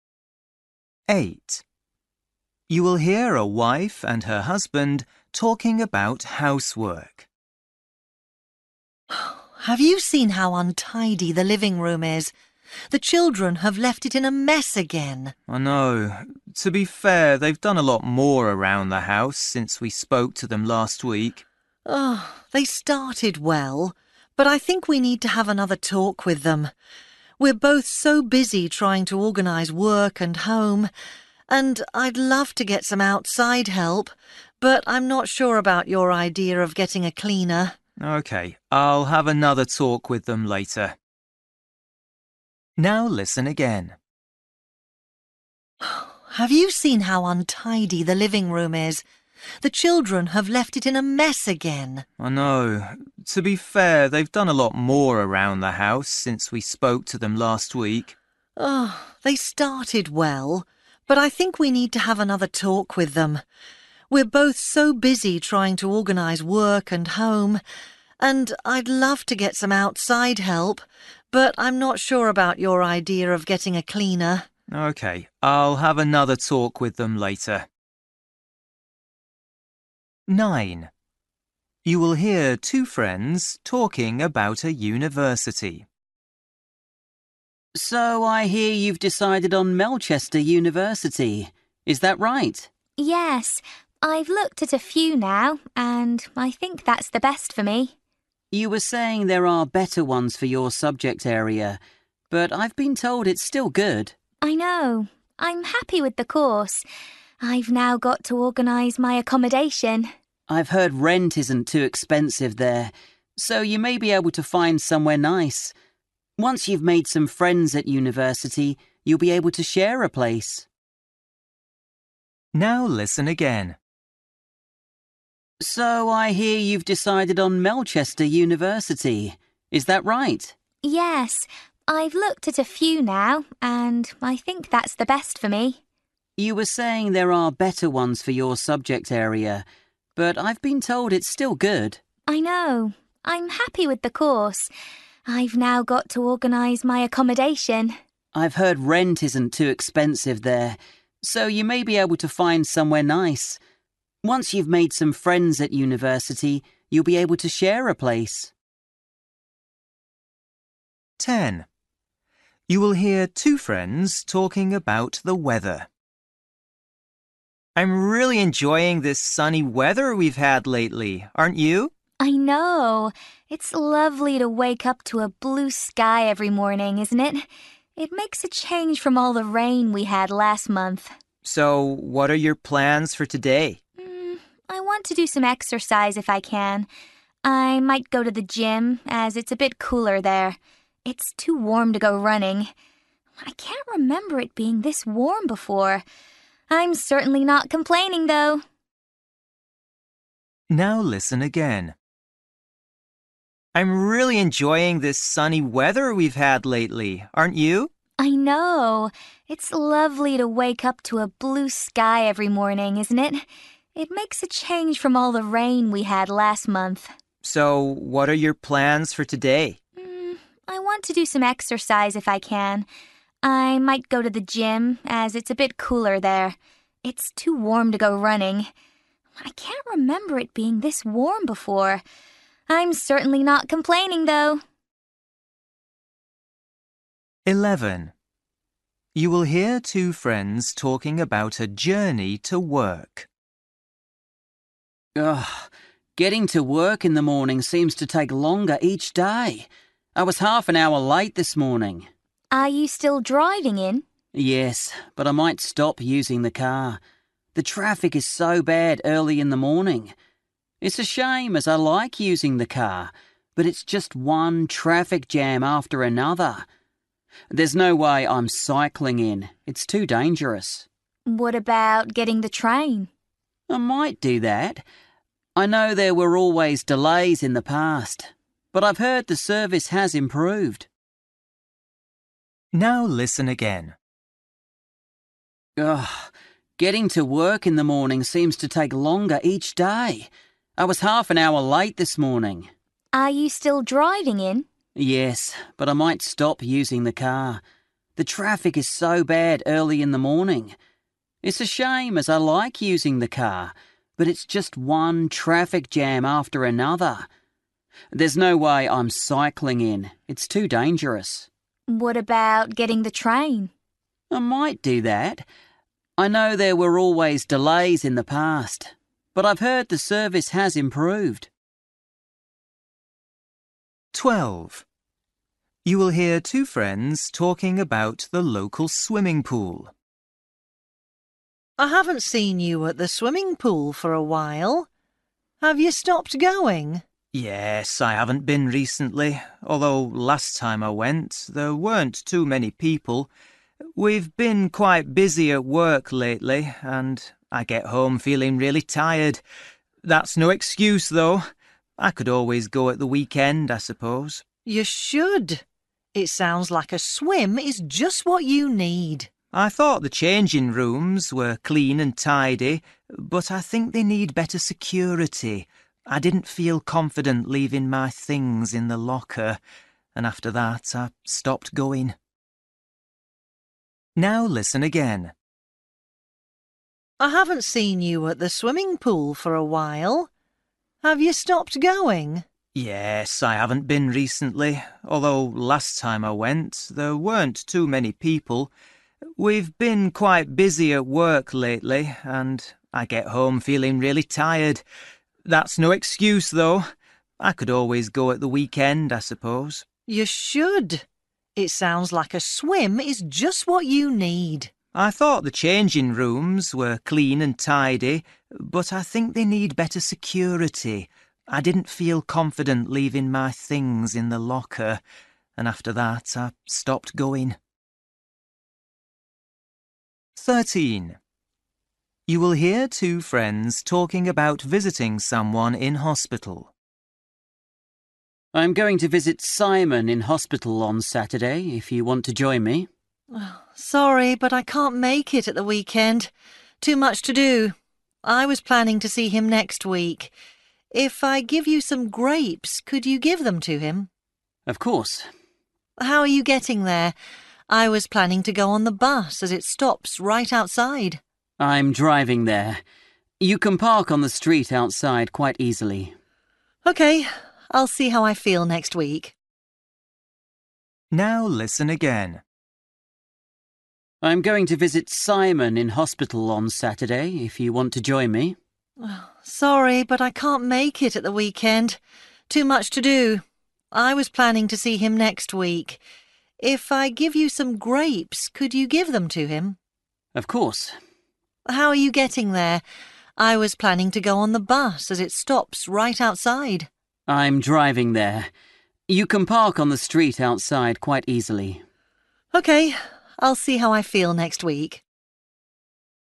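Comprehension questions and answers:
For each question, choose the correct answer.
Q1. You will hear a wife and her husband talking about housework. The woman thinks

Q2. You will hear two friends talking about a university. What does the man think about the woman's choice?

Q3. You will hear two friends talking about the weather. The woman says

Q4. You will hear two friends talking about a journey to work. What does the man say?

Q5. You will hear two friends talking about the local swimming pool. The man doesn't use it because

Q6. You will hear two friends talking about visiting someone in hospital. What does the woman decide to do?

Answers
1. they need to talk to the children again
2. It's still a good university, though others are better for her subject.
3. she can't remember it being this warm before
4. He might stop driving and take the train because the traffic is so bad.
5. he didn't feel his things were safe in the lockers
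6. Visit him next week rather than at the weekend.

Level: Luyện nghe trình độ B1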